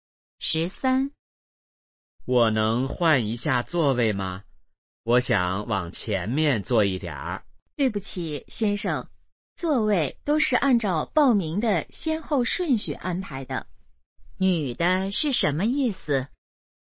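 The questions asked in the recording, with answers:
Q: 女的是什么意思?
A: 不能换座位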